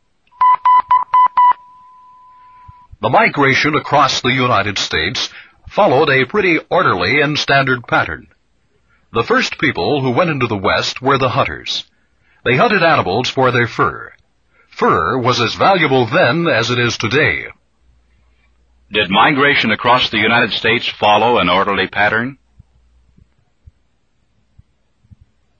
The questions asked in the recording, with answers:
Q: Did migration across the United States follow an orderly pattern?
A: Yes, it had an orderly pattern.